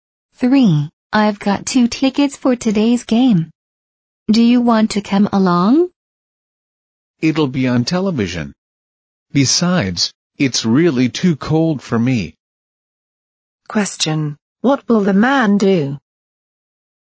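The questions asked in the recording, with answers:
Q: What will the man do?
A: Watch the game on television.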